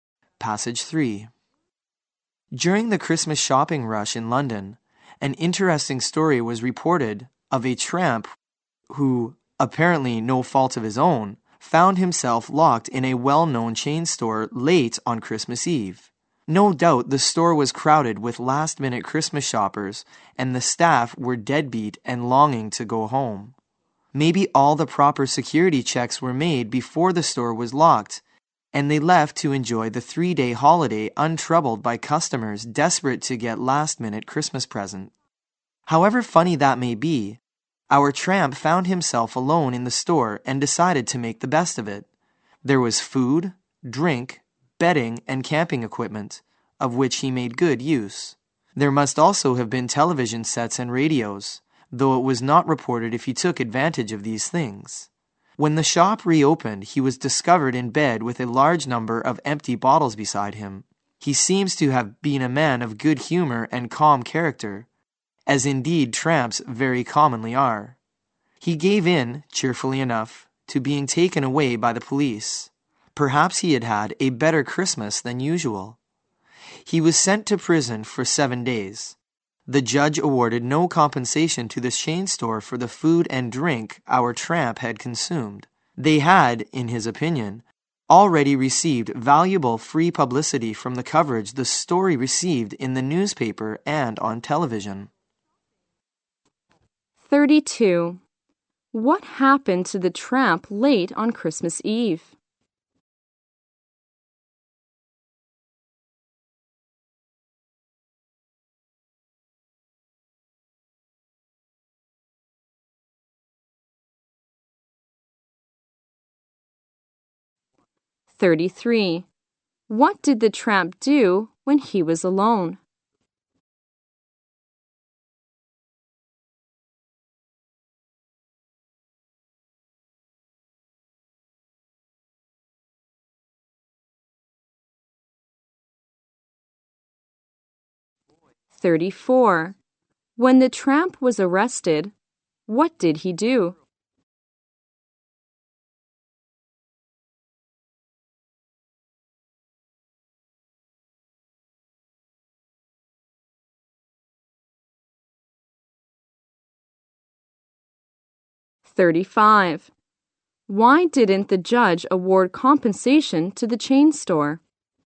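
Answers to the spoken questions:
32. He was locked inside a chain store.
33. He used the store's food, drink, bedding and camping equipment.
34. He went with the police cheerfully.
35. The store had already received valuable free publicity.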